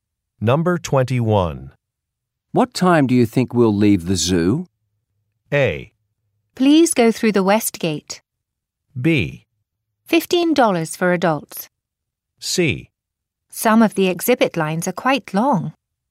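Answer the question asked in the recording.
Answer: C: Some of the exhibit lines are quite long.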